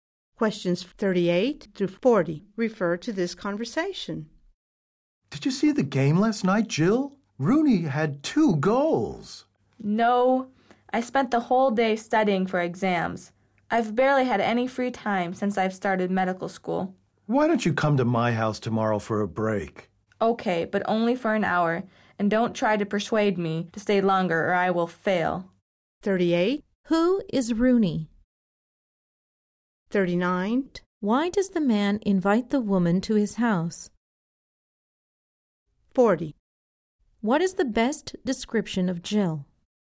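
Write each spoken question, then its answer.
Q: Who is Rooney?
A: A player who scored 2 goals

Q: Why does the man invite the woman to his house?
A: To take a break

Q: What is the best description of Jill?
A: A busy medical student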